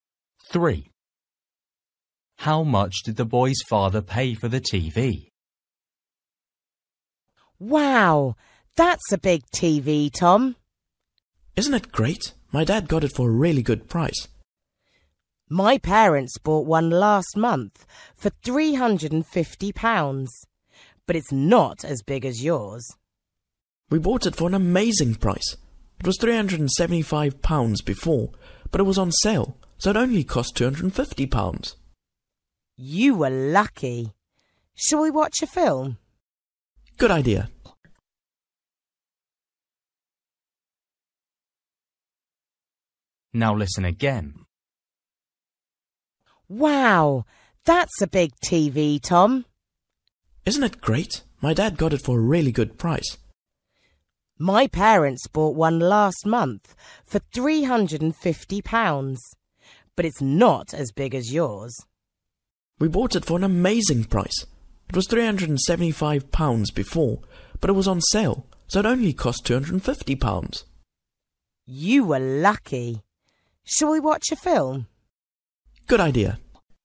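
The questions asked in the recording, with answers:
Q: How much did the boy's father pay for the TV?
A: £250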